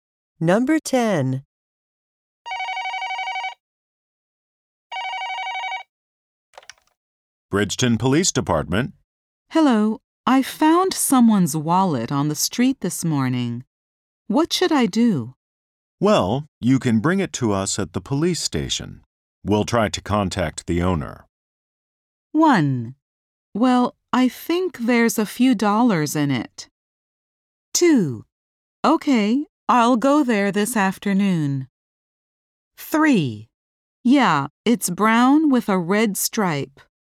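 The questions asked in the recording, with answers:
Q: We'll try to contact the owner.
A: 2: Okay, I'll go there this afternoon.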